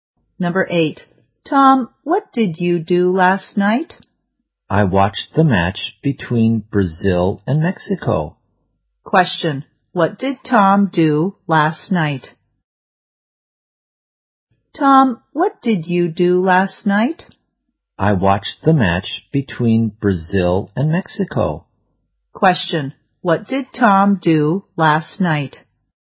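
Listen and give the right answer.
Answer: He watched the match between Brazil and Mexico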